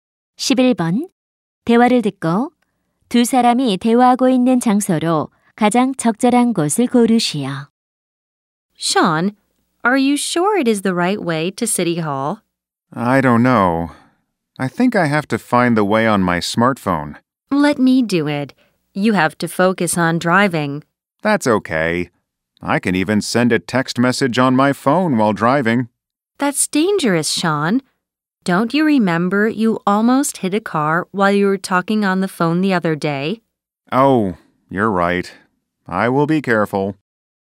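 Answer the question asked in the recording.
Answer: 자동차 안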